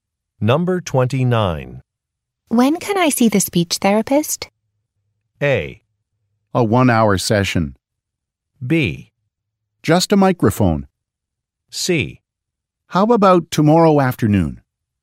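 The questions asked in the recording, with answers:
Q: When can I see the speech therapist?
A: C: How about tomorrow afternoon?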